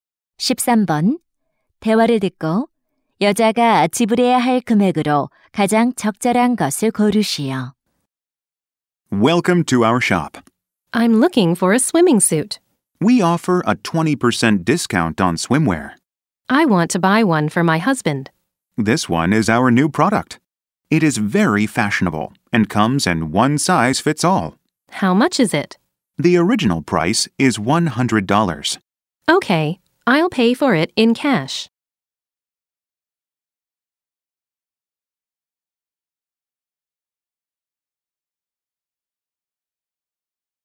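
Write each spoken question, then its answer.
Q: 대화를 듣고 여자가 지불해야 할 금액으로 가장 적절한 것을 고르시오.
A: 80달러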